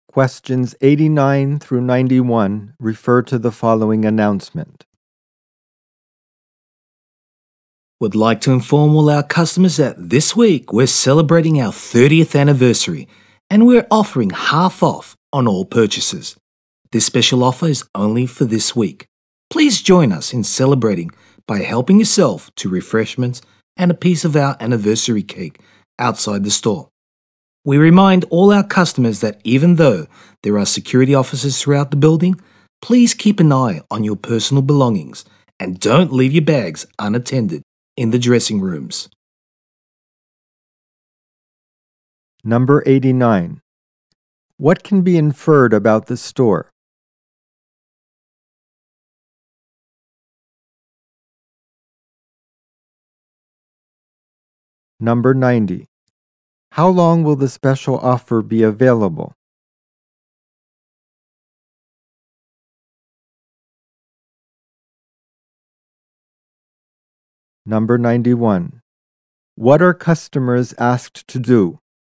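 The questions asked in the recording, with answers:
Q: How long will the special offer be available?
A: For one week (this week only).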